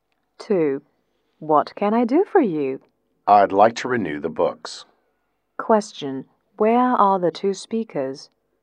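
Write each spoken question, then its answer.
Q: Where are the two speakers?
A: In a library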